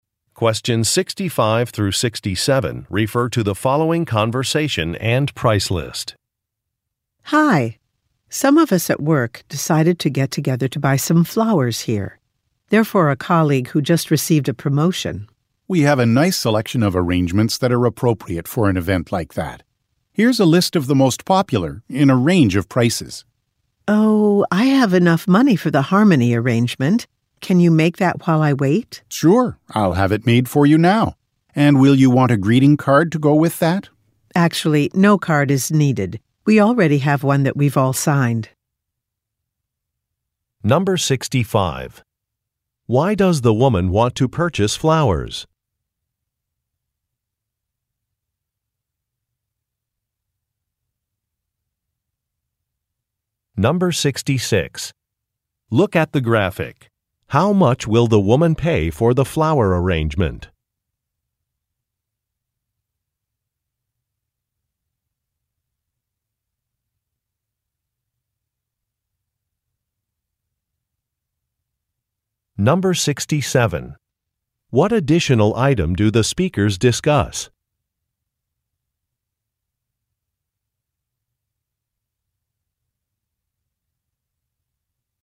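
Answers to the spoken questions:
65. For a colleague who just received a promotion
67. A greeting card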